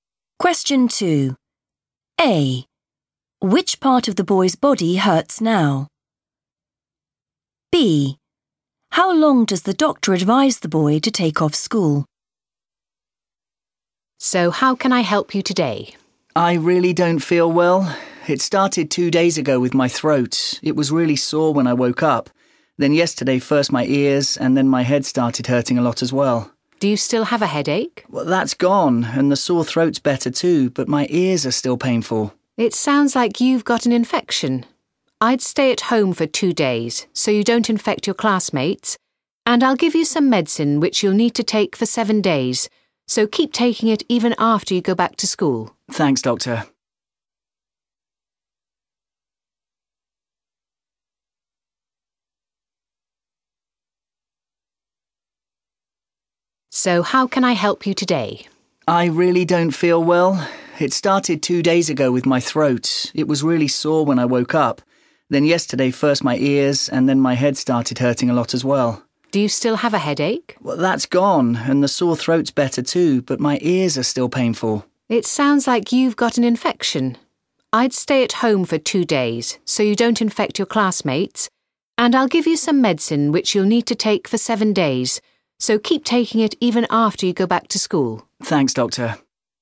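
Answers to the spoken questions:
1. his ears
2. 2 days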